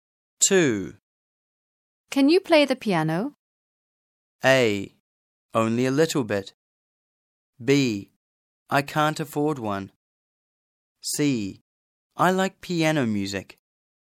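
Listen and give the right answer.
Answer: A: Only a little bit.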